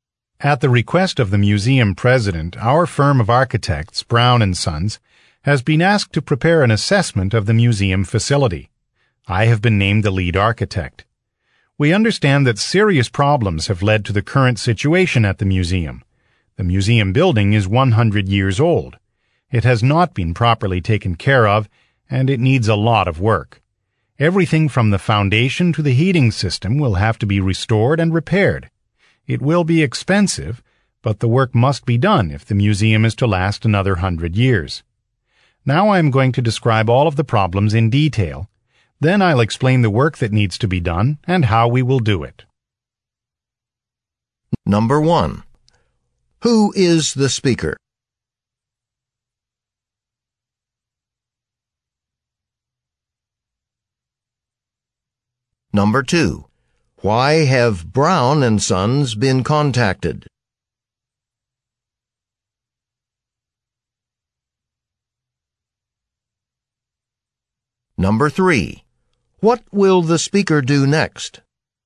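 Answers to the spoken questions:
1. The lead architect of Brown & Sons
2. To prepare an assessment of the museum facility
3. Describe all of the museum's problems in detail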